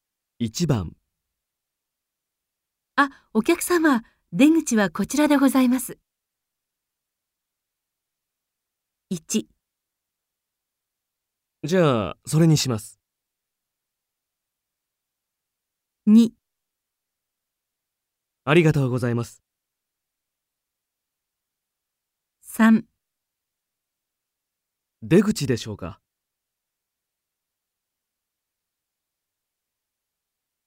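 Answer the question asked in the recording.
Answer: 2: ありがとうございます。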